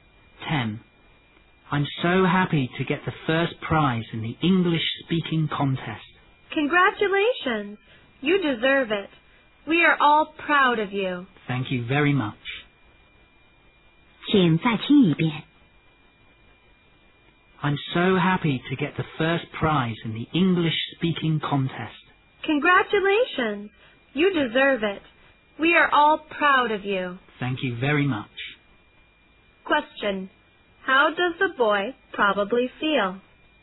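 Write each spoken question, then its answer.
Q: How does the boy probably feel?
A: Happy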